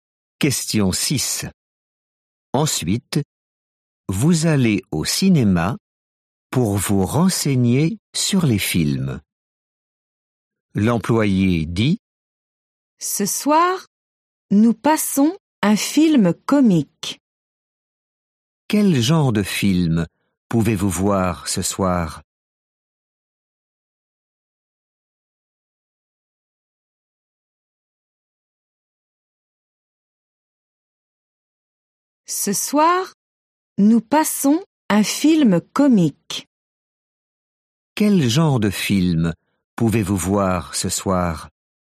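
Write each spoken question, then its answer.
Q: Quel genre de film pouvez-vous voir ce soir?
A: un film comique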